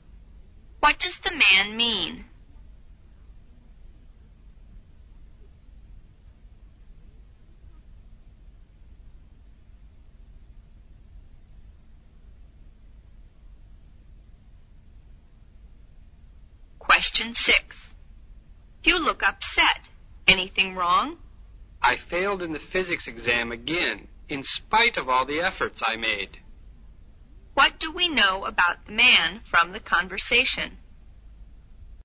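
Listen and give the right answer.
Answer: He failed the physics exam again despite working hard.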